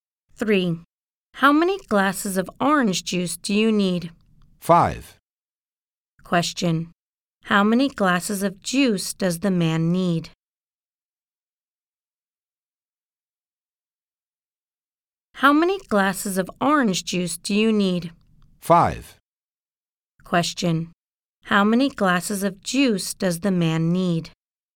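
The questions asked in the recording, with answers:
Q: How many glasses of juice does the man need?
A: Five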